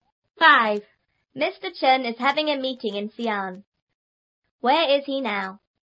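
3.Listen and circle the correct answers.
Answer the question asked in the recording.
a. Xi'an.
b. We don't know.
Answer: a. Xi'an.

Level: 初中英语广州版3B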